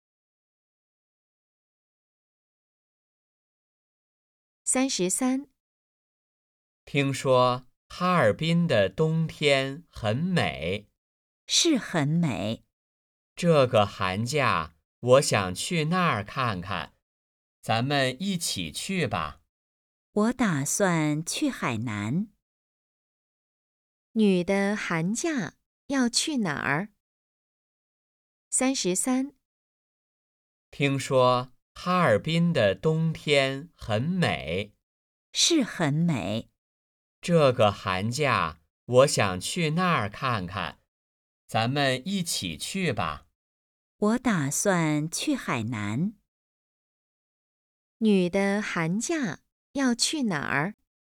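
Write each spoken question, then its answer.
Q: 女的寒假要去哪儿?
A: 海南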